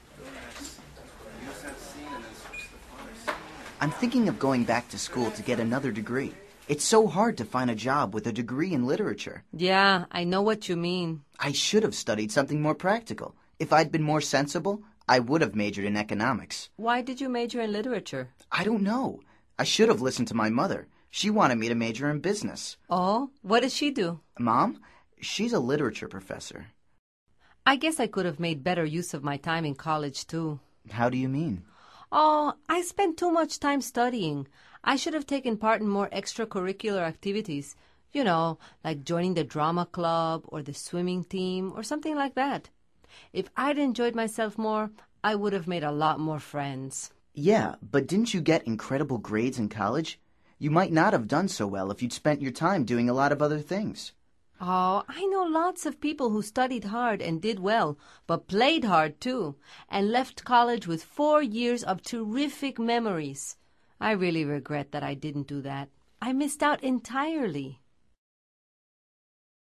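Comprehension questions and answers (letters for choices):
Activity 17: Basándote en los comentarios anteriores, selecciona las opciones más adecuadas para cada oración. Verifica luego las respuestas correctas.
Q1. Victor complains about ...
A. his degree in business.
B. not finding a job.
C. not being a literature professor.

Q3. Amalia regrets that she ...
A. got incredible grades in college.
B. spent too much time studying.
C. took part in the swimming team.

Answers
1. B
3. B

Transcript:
I'm thinking of going back to school to get another degree. It's so hard to find a job with a degree in literature.
Yeah, I know what you mean.
I should have studied something more practical. If I'd been more sensible, I would have majored in economics.
Why did you major in literature?
I don't know! I should have listened to my mother. She wanted me to major in business.
Oh? What does she do?
Mom? She's a literature professor.
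I guess I could have made better use of my time in college, too.
How do you mean?
Oh, I spent too much time studying. I should have taken part in more extracurricular activities – you know, like joining the drama club or the swimming team or something like that. If I'd enjoyed myself more, I would have made a lot more friends.
Yeah, but didn't you get incredible grades in college? You might not have done so well if you'd spent your time doing a lot of other things.
Oh, I know lots of people who studied hard and did well – but played hard, too – and left college with four years of terrific memories. I really regret that I didn't do that. I missed out entirely.

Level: Nivel Avanzado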